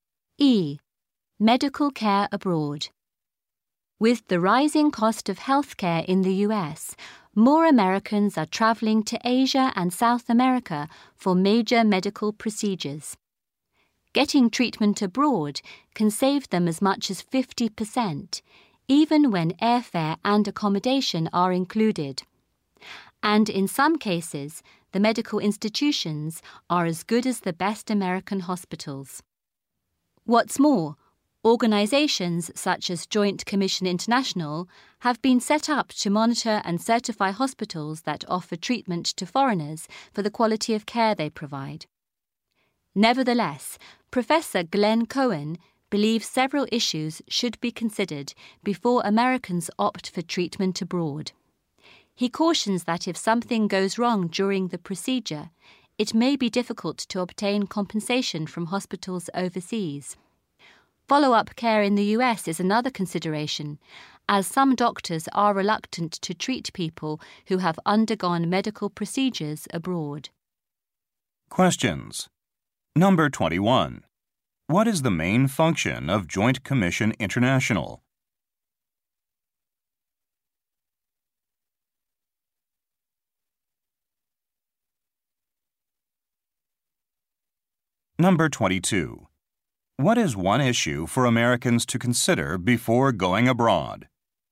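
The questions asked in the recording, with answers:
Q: What is the main function of Joint Commission International?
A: To monitor and certify the quality of care at hospitals treating foreigners

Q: What is one issue for Americans to consider before going abroad?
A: It may be hard to get compensation if something goes wrong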